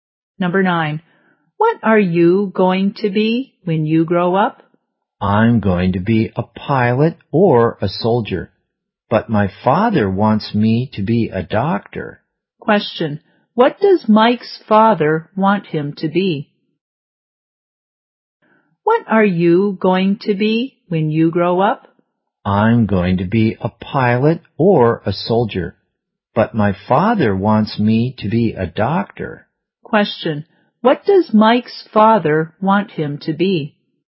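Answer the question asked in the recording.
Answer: A doctor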